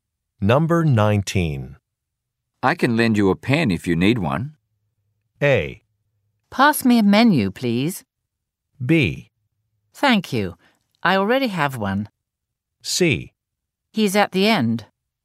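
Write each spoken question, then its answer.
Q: I can lend you a pen if you need one.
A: B: Thank you. I already have one.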